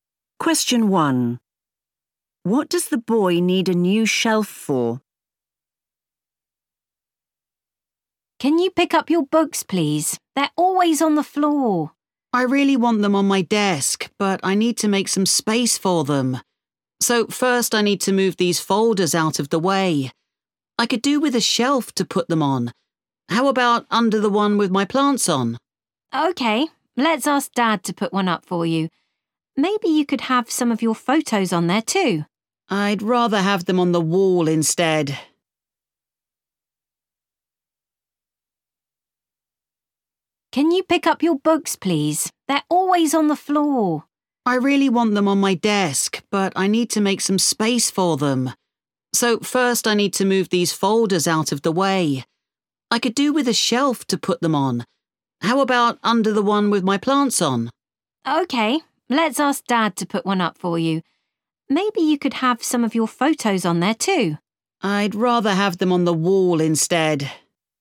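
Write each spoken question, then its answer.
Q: What does the boy need a new shelf for?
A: His folders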